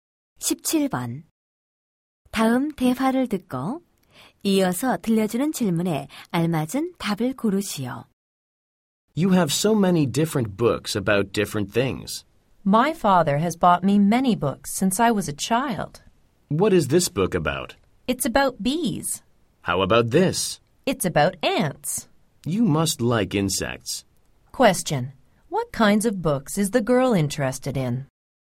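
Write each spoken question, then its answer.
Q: What kinds of books is the girl interested in?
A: Books about insects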